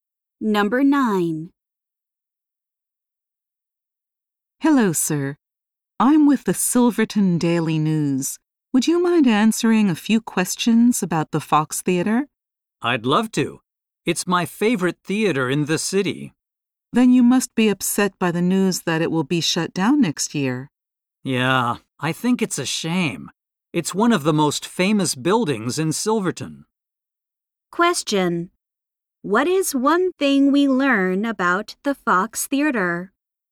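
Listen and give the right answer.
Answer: It will be shut down next year.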